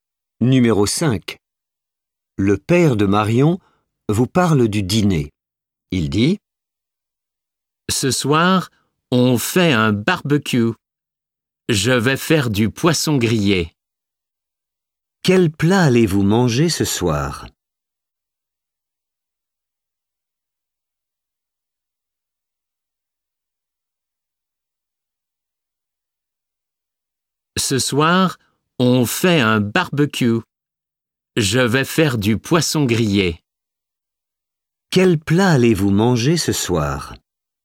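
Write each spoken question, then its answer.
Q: Quel plat allez-vous manger ce soir ?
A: Du poisson grillé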